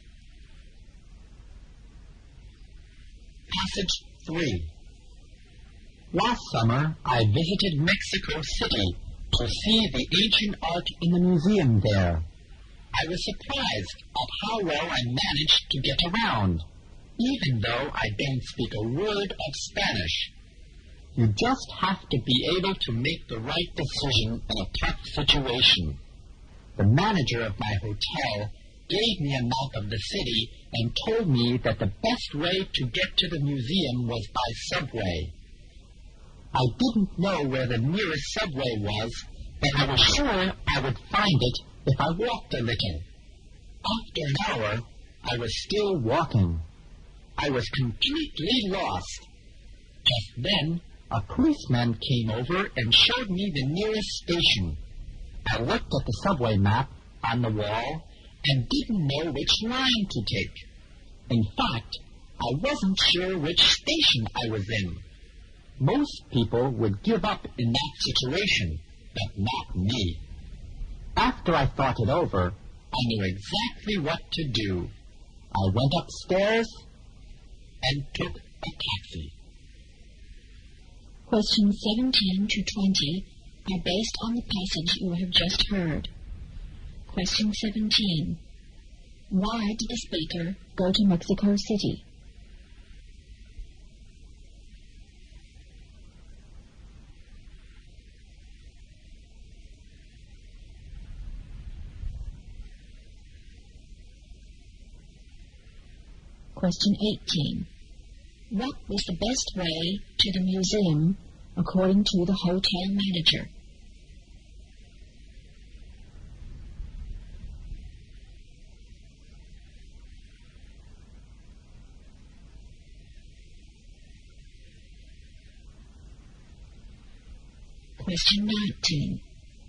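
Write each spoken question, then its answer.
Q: Why did the speaker go to Mexico City?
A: To see the ancient art in the museum

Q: What was the best way to the museum according to the hotel manager?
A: By subway

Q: Why did the speaker take a taxi?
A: He didn't know which subway line to take or even which station he was in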